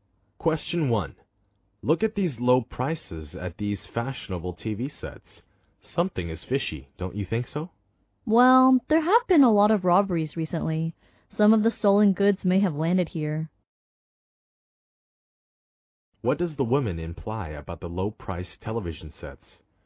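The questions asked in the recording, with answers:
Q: What does the woman imply about the low-priced television sets?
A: They may be stolen goods.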